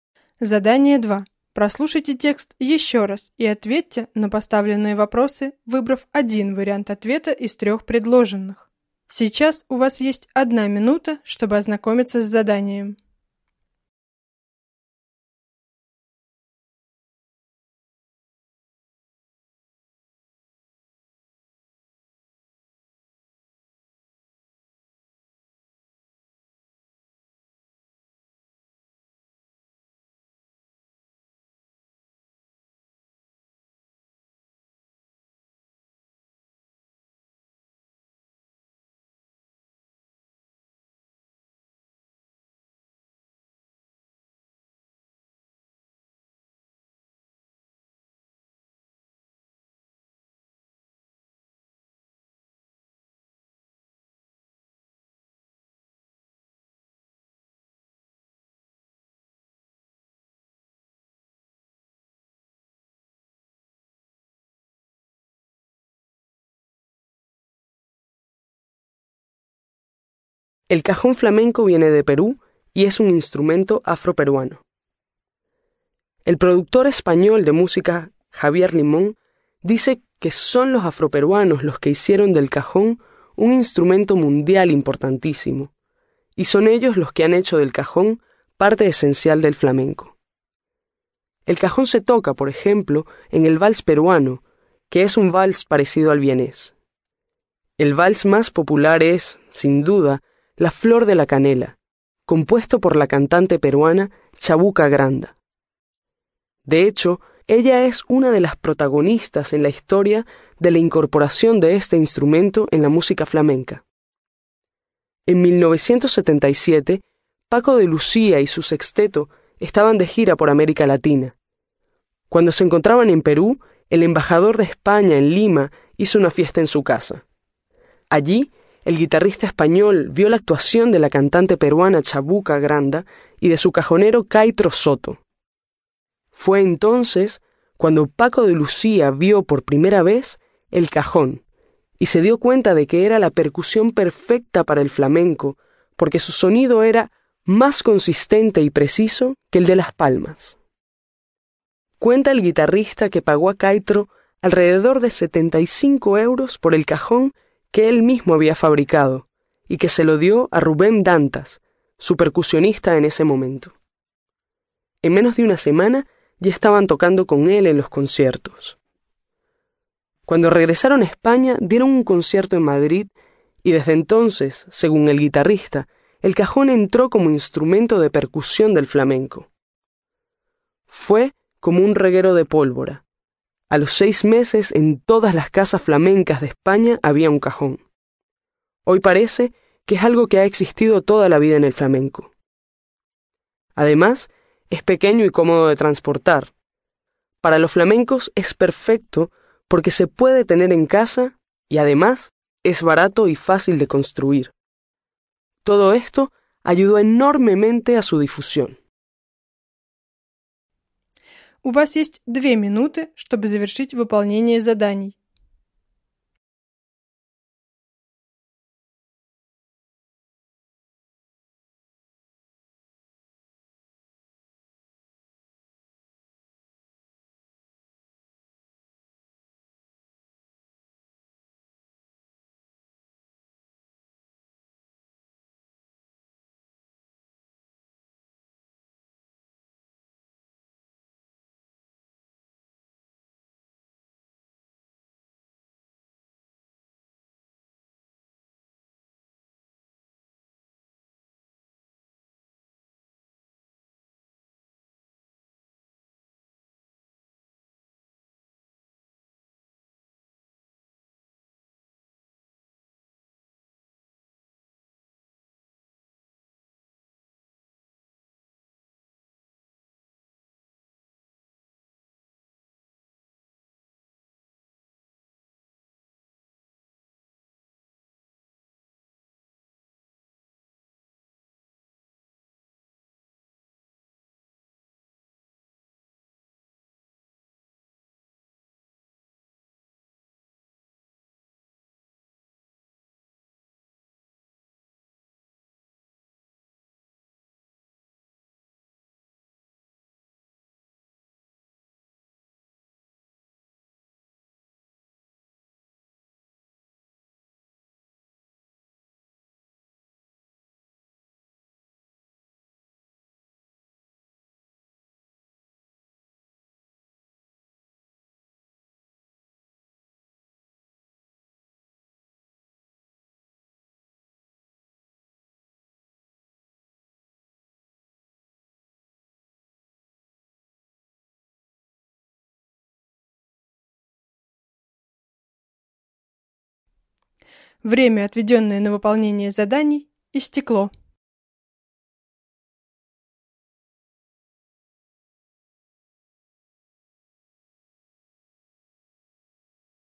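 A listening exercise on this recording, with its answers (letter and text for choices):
No 8-15. Прослушайте текст ещё раз и закончите предложения, выбрав один вариант ответа из трёх предложенных.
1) El cajón se toca en...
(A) La salsa venezolana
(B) El merengue dominicano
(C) El vals peruano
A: (C) El vals peruano

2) La gira de Paco de Lucía y su grupo en 1977 se hizo en...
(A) Europa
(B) América Latina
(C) Asia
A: (B) América Latina

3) El famoso guitarrista, Paco de Lucía, pagó por el cajón alrededor de...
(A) 7500 euros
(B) 750 euros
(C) 75 euros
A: (C) 75 euros

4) La fiesta que organizó el Embajador de España fue en...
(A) Lima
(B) Limón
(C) Linares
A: (A) Lima

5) El cajón tiene un sonido más consistente que...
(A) El tambor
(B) Las maracas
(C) Las palmas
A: (C) Las palmas

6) El percusionista de Paco de Lucía se llamaba...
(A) Rubén Blades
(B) Rubem Dantas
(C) Rubén Darío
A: (B) Rubem Dantas

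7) En todas las casas flamencas de España ya había un cajón...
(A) A los 6 años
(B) A los 6 días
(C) A los 6 meses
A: (C) A los 6 meses

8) El cajón es un instrumento...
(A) Barato y difícil de construir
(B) Poco barato y fácil de construir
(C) Barato y fácil de construir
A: (C) Barato y fácil de construir

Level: 6-7 классов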